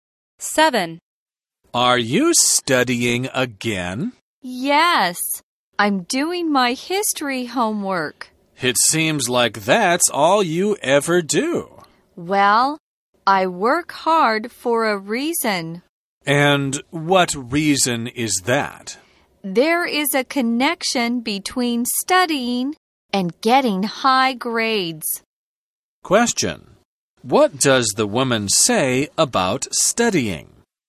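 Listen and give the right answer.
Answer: There is a connection between studying and getting high grades.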